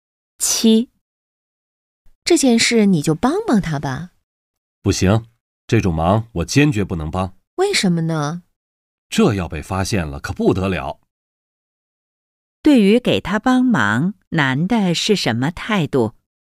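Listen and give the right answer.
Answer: 坚决不帮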